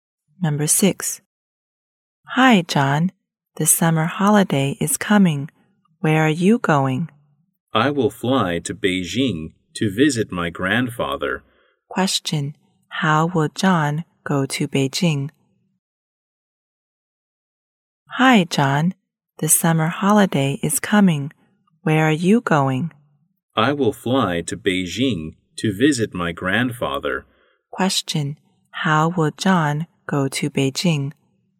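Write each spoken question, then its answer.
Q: Question. How will John go to Beijing?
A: By plane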